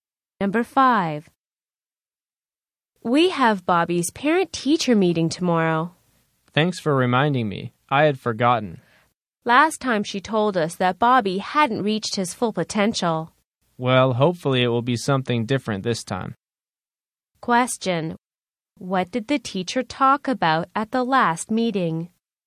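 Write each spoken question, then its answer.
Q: What did the teacher talk about at the last meeting?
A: That Bobby hadn't reached his full potential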